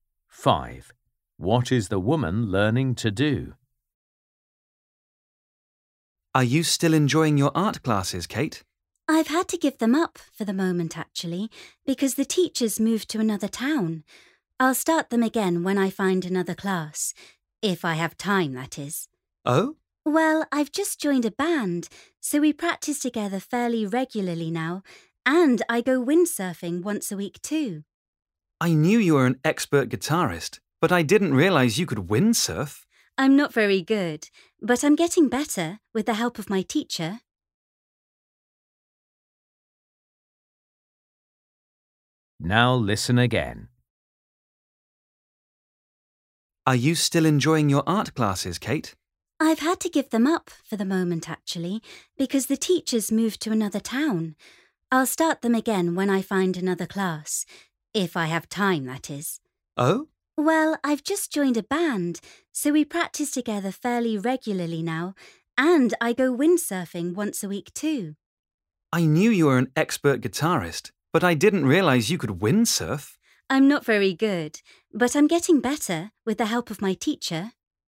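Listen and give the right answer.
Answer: Windsurf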